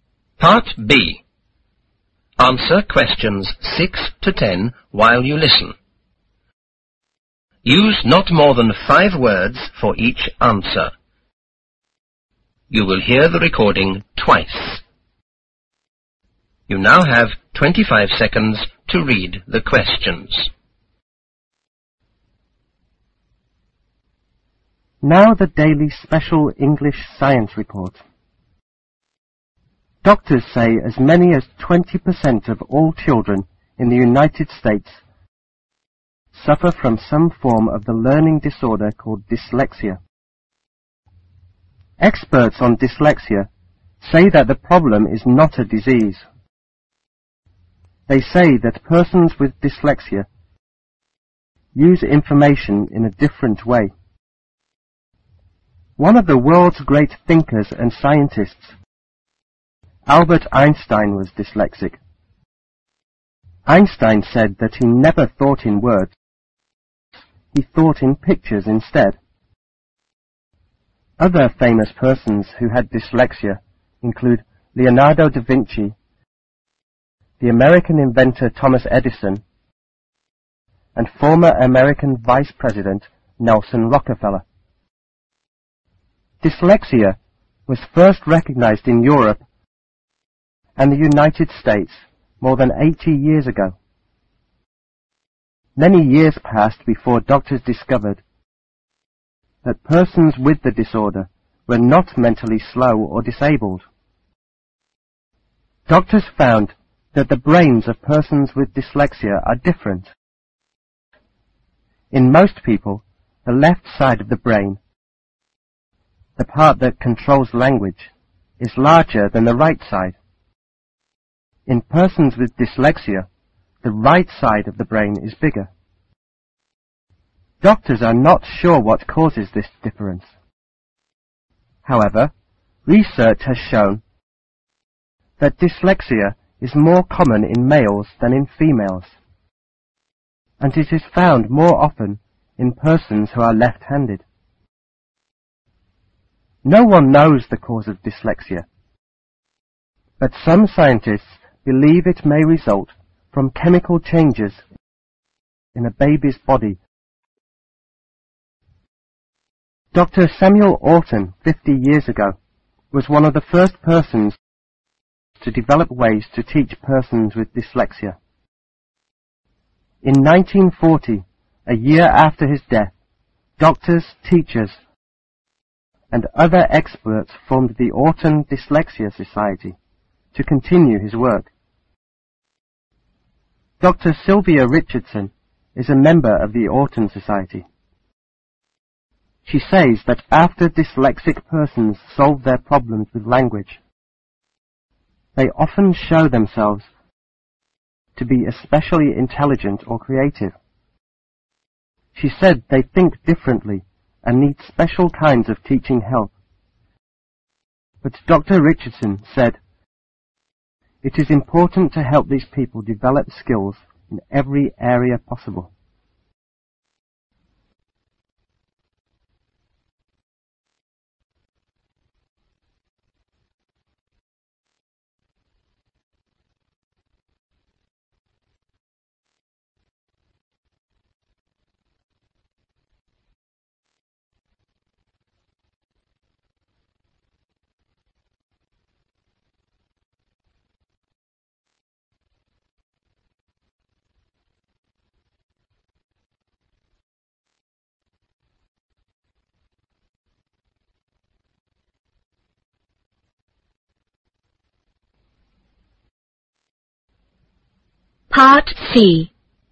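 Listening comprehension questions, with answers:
Answer questions 6-10 while you. Listen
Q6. What kind of disorder is dyslexia?( ).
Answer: a learning disorder

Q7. When was dyslexia first recognized in Europe and U.S.A.? ( ).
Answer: more than 80 years ago

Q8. In persons with dyslexia,which side of the brain is larger?( ).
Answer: the right side

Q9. In what kind of people can dyslexia commonly be found? ( ).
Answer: males and left-handed persons

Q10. what are the characteristics of the dyslexic persons?( )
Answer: especially intelligent or creative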